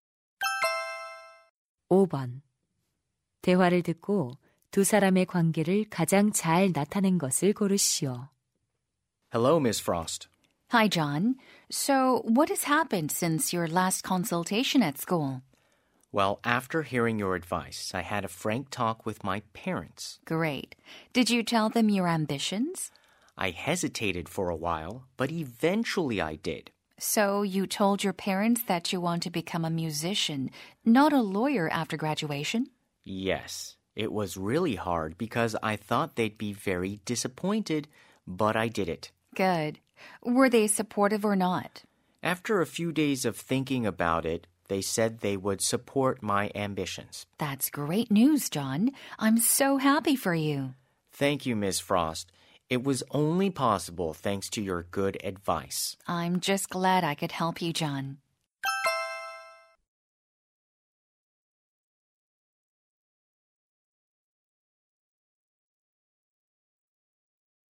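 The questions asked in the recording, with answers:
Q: 대화를 듣고 두 사람의 관계를 가장 잘 나타낸 것을 고르시오.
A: 진로 상담 교사 - 학생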